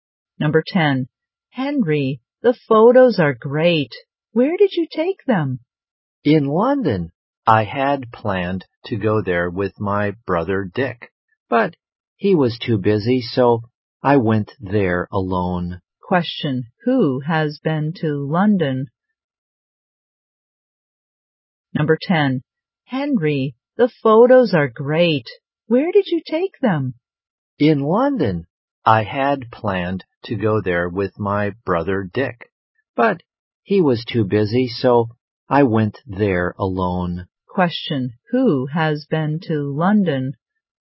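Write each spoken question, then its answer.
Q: Who has been to London?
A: Henry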